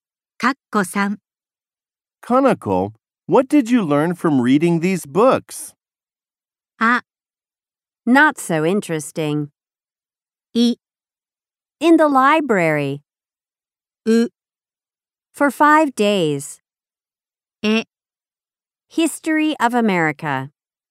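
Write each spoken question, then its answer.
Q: Kanako, what did you learn from reading these books?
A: え: History of America.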